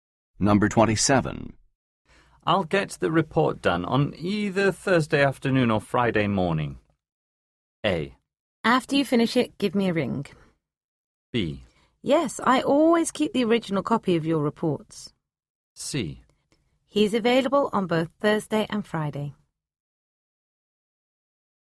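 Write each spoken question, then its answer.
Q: I'll get the report done on either Thursday afternoon or Friday morning.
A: A: After you finish it, give me a ring.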